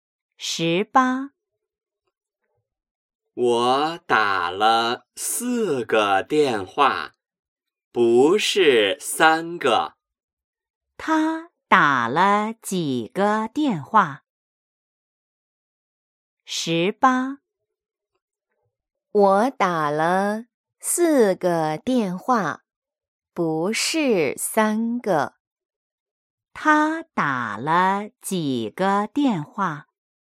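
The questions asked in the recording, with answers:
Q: 他打了几个电话?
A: 四个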